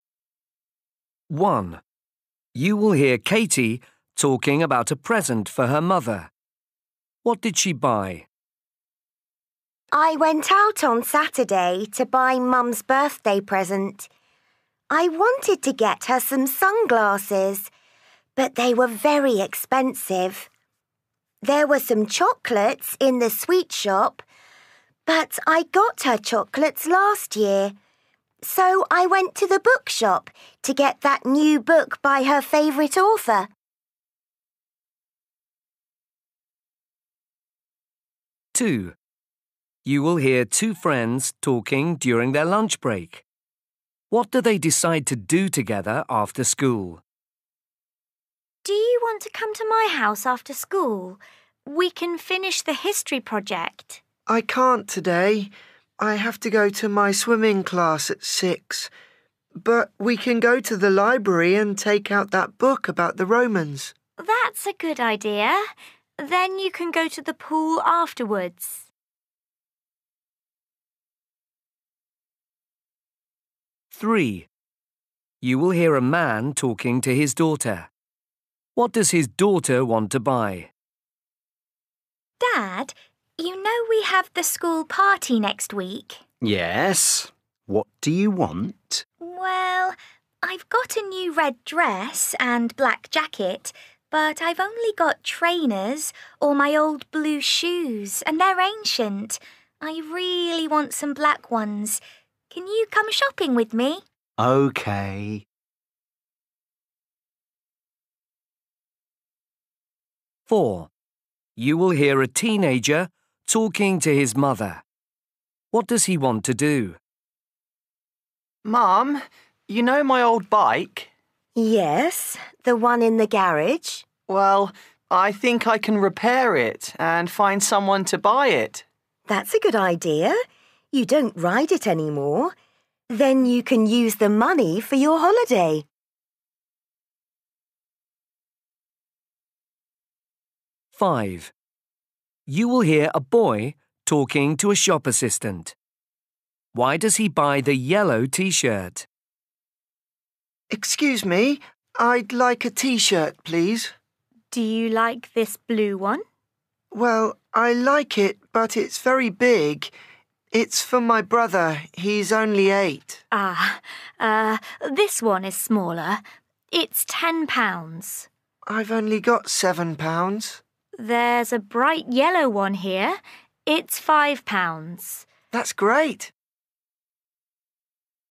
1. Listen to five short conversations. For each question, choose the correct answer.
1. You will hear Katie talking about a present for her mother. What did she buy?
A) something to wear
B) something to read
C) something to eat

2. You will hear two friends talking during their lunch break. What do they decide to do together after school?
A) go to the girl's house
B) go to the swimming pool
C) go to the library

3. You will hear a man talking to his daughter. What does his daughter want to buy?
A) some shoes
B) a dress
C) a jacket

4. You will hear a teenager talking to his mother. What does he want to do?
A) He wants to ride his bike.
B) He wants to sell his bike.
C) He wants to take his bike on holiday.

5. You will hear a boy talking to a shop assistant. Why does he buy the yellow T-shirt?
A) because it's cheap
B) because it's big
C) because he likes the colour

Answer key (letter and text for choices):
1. B) something to read
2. C) go to the library
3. A) some shoes
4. B) He wants to sell his bike.
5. A) because it's cheap

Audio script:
1 You will hear Katie talking about a present for her mother. What did she buy?
Katie: I went out on Saturday to buy Mum's birthday present. I wanted to get her some sunglasses, but they were very expensive. There were some chocolates in the sweet shop but I got her chocolates last year, so I went to the bookshop to get that new book by her favourite author.
2 You will hear two friends talking during their lunch break. What do they decide to do together after school?
Girl: Do you want to come to my house after school? We can finish the history project.
Boy: I can't today. I have to go to my swimming class at six. But we can go to the library and take out that book about the Romans.
Girl: That's a good idea. Then you can go to the pool afterwards.
3 You will hear a man talking to his daughter. What does his daughter want to buy?
Girl: Dad, you know we have the school party next week?
Dad: Yes, what do you want?
Girl: Well, I've got a new red dress and black jacket but I've only got trainers or my old blue shoes and they're ancient. I really want some black ones. Can you come shopping with me?
Dad: OK.
4 You will hear a teenager talking to his mother. What does he want to do?
Boy: Mum, you know my old bike?
Mum: Yes, the one in the garage.
Boy: Well, I think I can repair it and find someone to buy it.
You don't ride it anymore. Then you can use the money for your holiday.
5 You will hear a boy talking to a shop assistant. Why does he buy the yellow T-shirt?
Boy: Excuse me. I'd like a T-shirt, please.
Assistant: Do you like this blue one?
Boy: Well, I like it but it's very big. It's for my brother. He's only eight.
Assistant: Ah, this one is smaller. It's £10.
Assistant: There's a bright yellow one here. It's £5.
Boy: That's great!